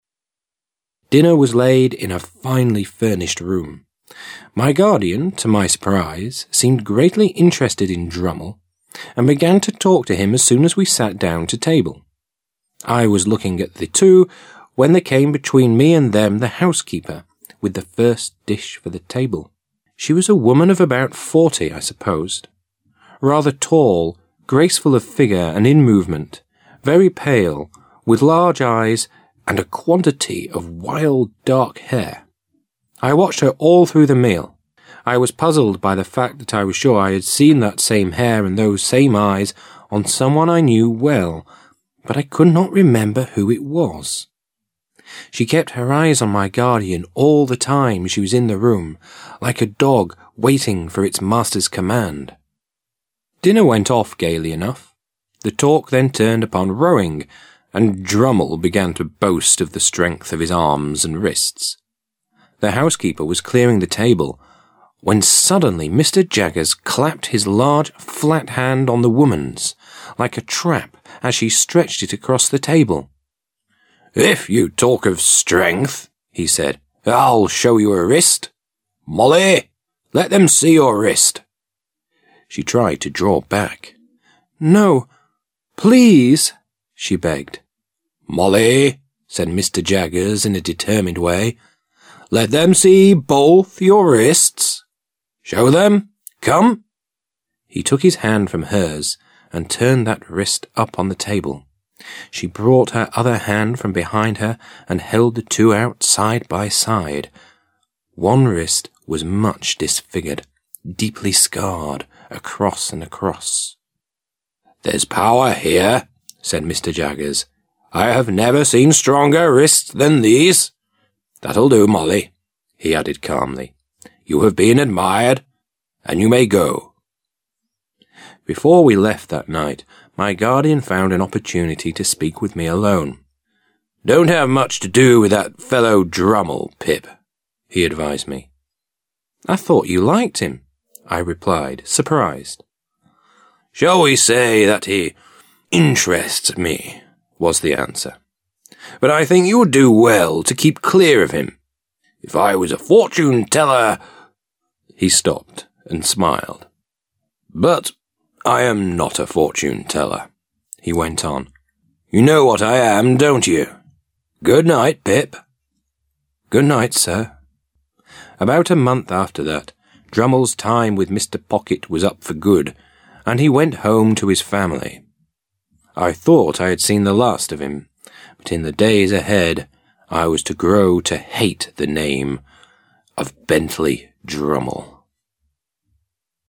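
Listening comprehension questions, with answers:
Task 2. Listen to the track 9_02 and decide which of the statements are true (T) and which are false (F).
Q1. Pip's guardian, to his surprise, seemed greatly interested in Drummle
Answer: T

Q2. The housekeeper was a woman of about fifty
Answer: F

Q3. Pip watched his guardian all through the meal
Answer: F

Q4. Dinner went off gaily enough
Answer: T

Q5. The talk then turned upon rowing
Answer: T

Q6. Pip began to boast of the strength of his arms and wrists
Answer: F

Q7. Molly was Drummle's sister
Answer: F

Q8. Pip's guardian was a fortune-teller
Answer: F

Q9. Pip had seen the last of Drummle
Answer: F

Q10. In the days ahead Pip was to grow to hate the name of Bentley Drummle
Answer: T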